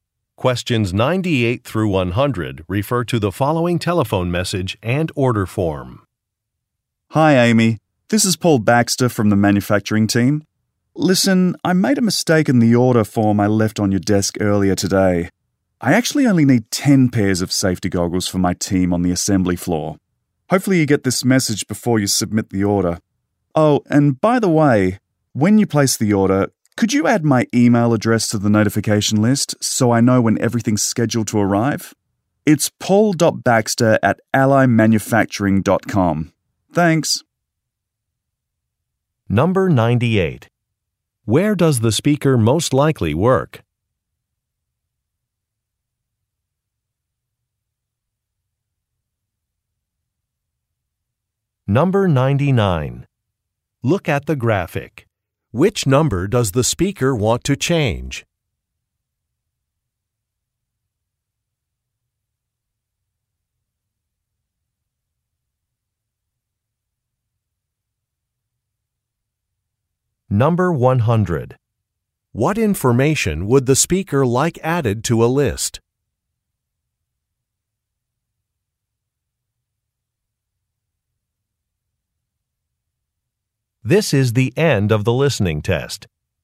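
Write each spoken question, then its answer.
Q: Where does the speaker most likely work?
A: At a manufacturing company (factory)

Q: What information would the speaker like added to a list?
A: His email address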